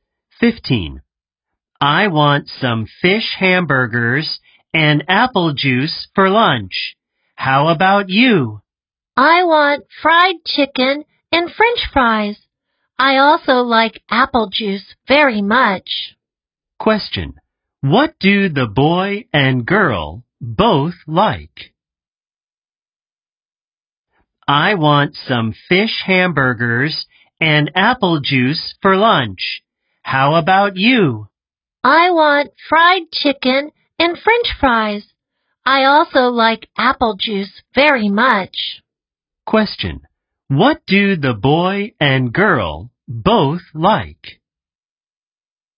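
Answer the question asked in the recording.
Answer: Apple juice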